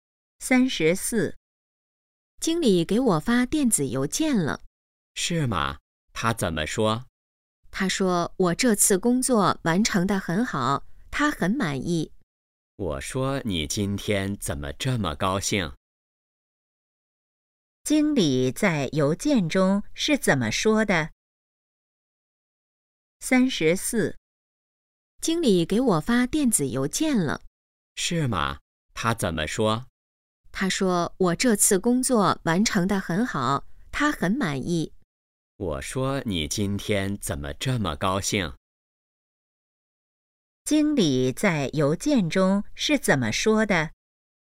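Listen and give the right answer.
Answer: 她这次工作完成得很好,他很满意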